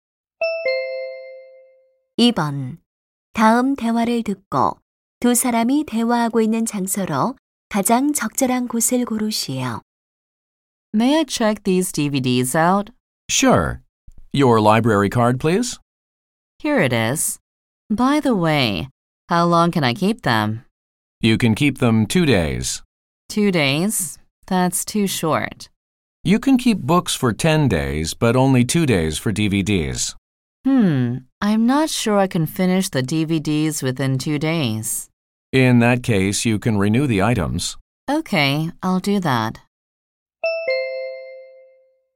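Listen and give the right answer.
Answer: 도서관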